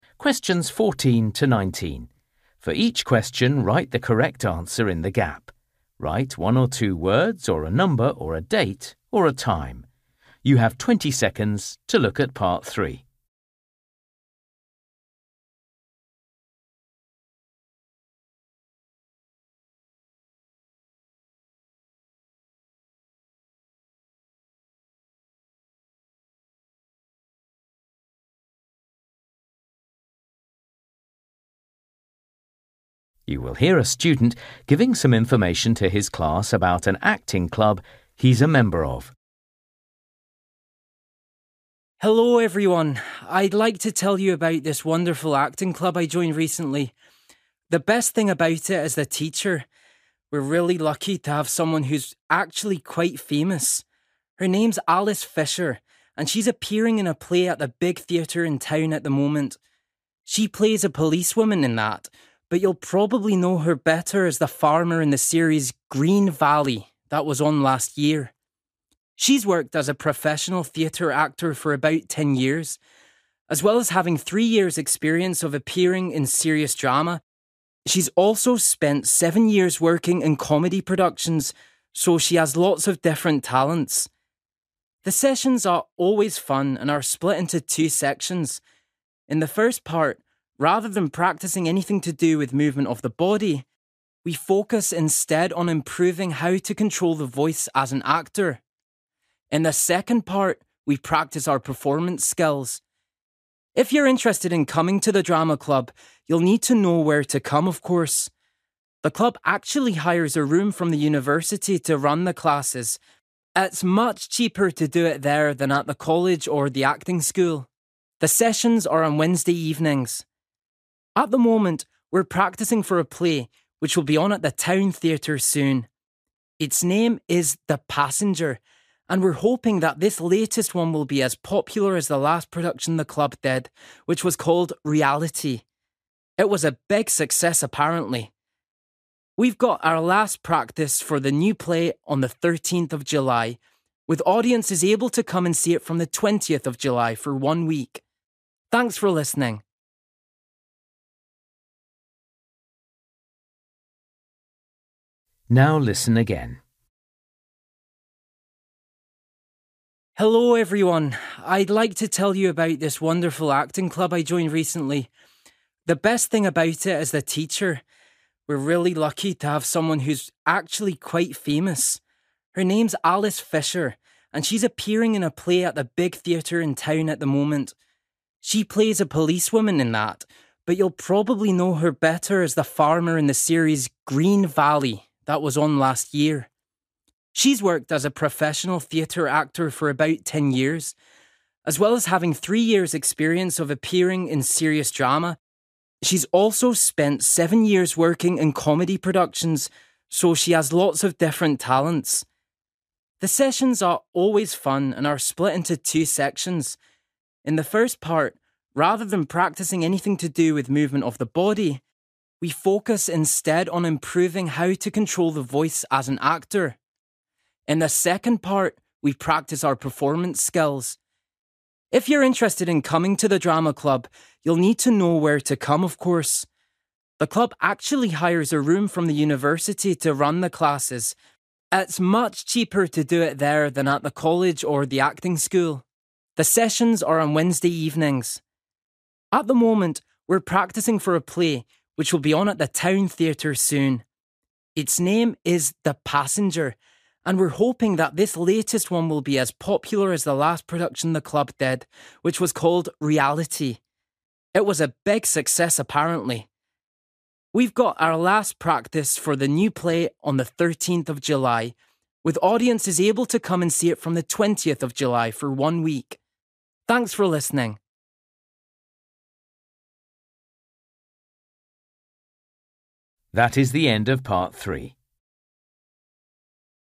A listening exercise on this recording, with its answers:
For each question, write the correct answer in the gap. Write one or two words or a number or a date or a time.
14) Appeared on TV as a (14) ....................................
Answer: farmer

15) Has mostly appeared in (15) .................................... shows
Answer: comedy

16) First part – using your (16) .................................... well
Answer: voice

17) Take place at the (17) ....................................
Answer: university

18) Called (18) ....................................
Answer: (The) Passenger

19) First performance – on (19) ....................................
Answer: 20th / twentieth July / 20/7 / 7/20

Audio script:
For each question, write the correct answer in the gap. Write one or two words or a number or a date or a time.
You will hear a student giving some information to his class about an acting club he's a member of.
My acting club
Teacher:
Sessions:
Second part – practising performance skills
Acting Club play:
14 farmer 15 comedy 16 voice
17 university 18 (The) Passenger
19 20th / twentieth July / 20/7 / 7/20
Hello, everyone! I'd like to tell you about this wonderful acting club I joined recently. The best thing about it is the teacher. We're really lucky to have someone who's actually quite famous. Her name's Alice Fisher, and she's appearing in a play at the big theatre in town at the moment. She plays a policewoman in that, but you'll probably know her better as the farmer in the series 'Green Valley' that was on last year.
She's worked as a professional theatre actor for about 10 years. As well as having three years' experience of appearing in serious drama, she's also spent seven years working in comedy productions, so has lots of different talents.
The sessions are always fun and are split into two sections. In the first part, rather than practising anything to do with movement of the body, we focus instead on improving how to control the voice as an actor. In the second part, we practise our performance skills.
If you're interested in coming to the drama club, you'll need to know where to come, of course. The club actually hires a room from the university to run the classes. It's much cheaper to do it there than at the college or the acting school. The sessions are on Wednesday evenings.
At the moment, we're practising for a play, which will be on at the Town Theatre soon. Its name is 'The Passenger' and we're hoping that this latest one will be as popular as the last production the club did, which was called 'Reality'. It was a big success, apparently.
We've got our last practice for the new play on the thirteenth of July, with audiences able to come and see it from twentieth of July for one week.
Thanks for listening.